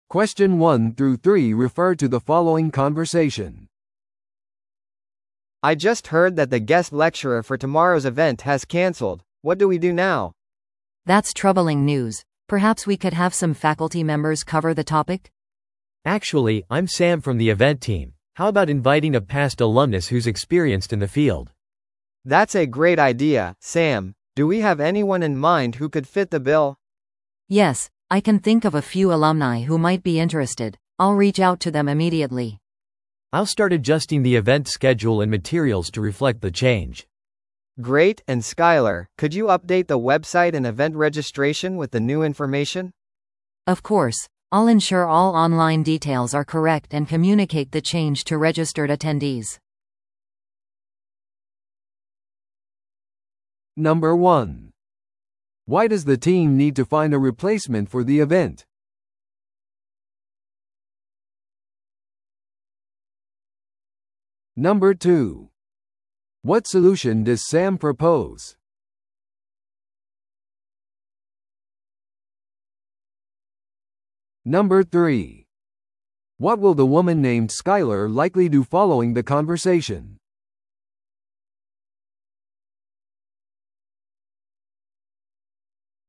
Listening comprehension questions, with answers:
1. Why does the team need to find a replacement for the event?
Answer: 元のゲスト講師が利用できない。

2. What solution does Sam propose?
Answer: 経験豊富な卒業生を招待する。

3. What will the woman named Skyler likely do following the conversation?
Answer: ウェブサイトを更新し、登録済みの出席者に通知する。

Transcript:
A: I just heard that the guest lecturer for tomorrow's event has canceled. What do we do now?
B: That's troubling news. Perhaps we could have some faculty members cover the topic?
C: Actually, I'm Sam from the event team. How about inviting a past alumnus who's experienced in the field?
A: That's a great idea, Sam. Do we have anyone in mind who could fit the bill?
B: Yes, I can think of a few alumni who might be interested. I'll reach out to them immediately.
C: I'll start adjusting the event schedule and materials to reflect the change.
A: Great, and Skyler, could you update the website and event registration with the new information?
B: Of course. I'll ensure all online details are correct and communicate the change to registered attendees.